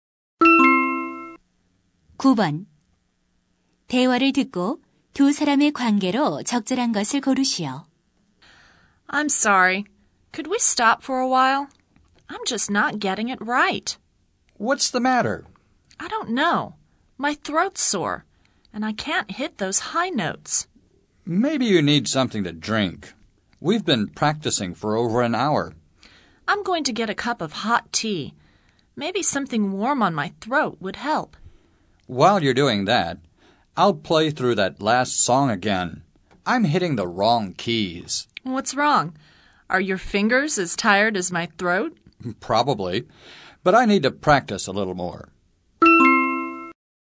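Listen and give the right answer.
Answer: 가수와 피아노 반주자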